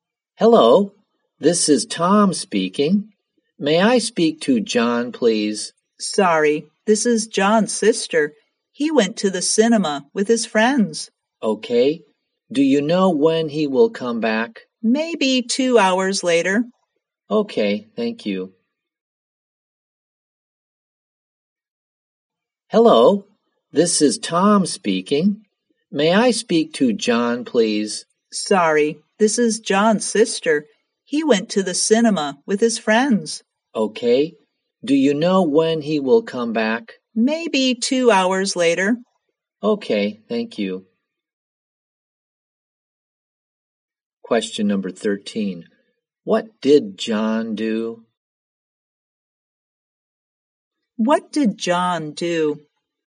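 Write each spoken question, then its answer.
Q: What did John do?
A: He went to the cinema with his friends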